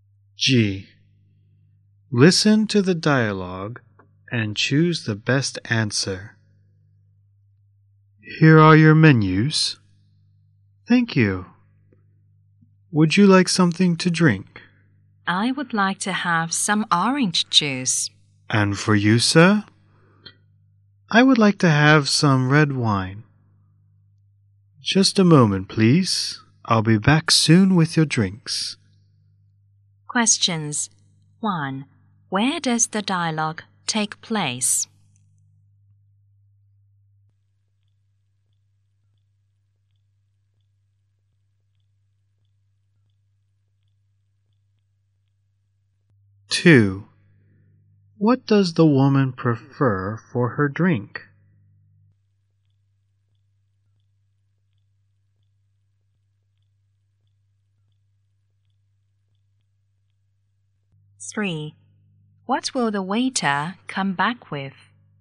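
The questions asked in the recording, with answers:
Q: Where does the dialogue take place?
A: In a restaurant

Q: What will the waiter come back with?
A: Their drinks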